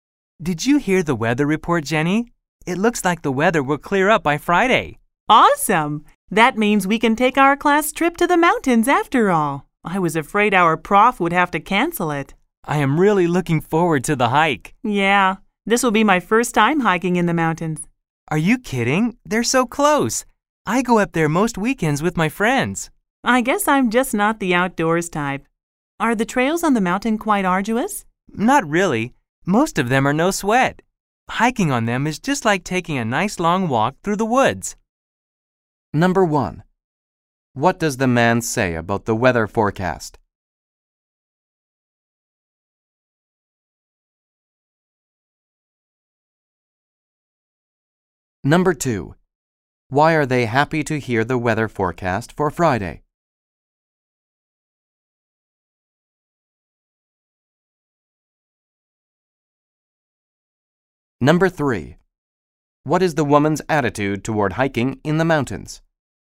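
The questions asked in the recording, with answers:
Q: What does the man say about the weather forecast?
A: The weather will clear up by Friday.

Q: Why are they happy to hear the weather forecast for Friday?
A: Their class trip to the mountains won't be canceled.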